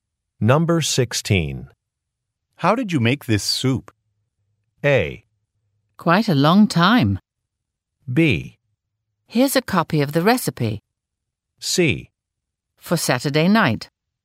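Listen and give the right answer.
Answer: B: Here's a copy of the recipe.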